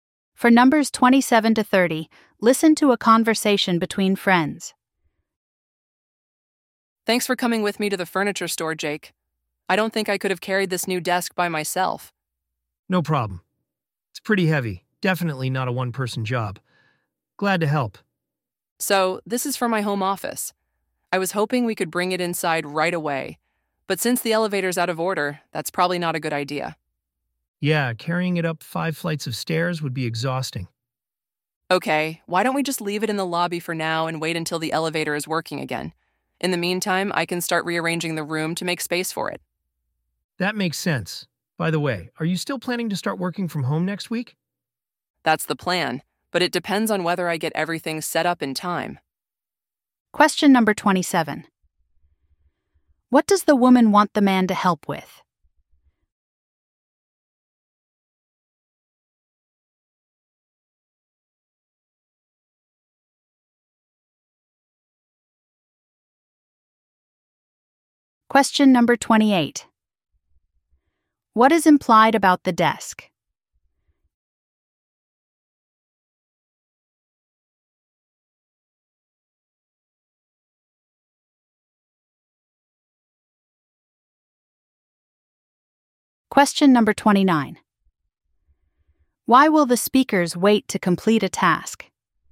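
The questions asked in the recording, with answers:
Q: What does the woman want the man to help with?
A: Carrying her new desk

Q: What is implied about the desk?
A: It is heavy

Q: Why will the speakers wait to complete a task?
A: The elevator is out of order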